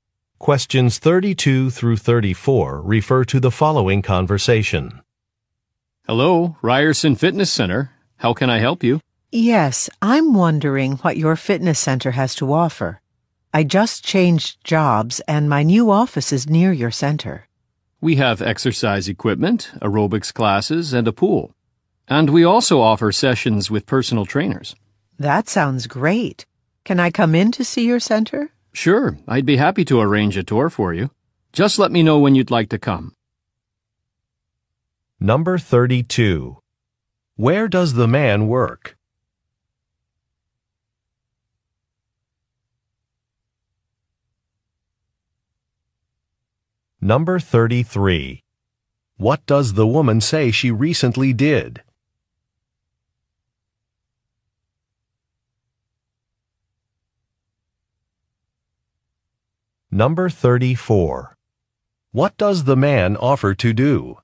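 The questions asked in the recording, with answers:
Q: Where does the man work?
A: At a fitness center (Ryerson Fitness Center)

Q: What does the woman say she recently did?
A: She changed jobs

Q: What does the man offer to do?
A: Arrange a tour of the center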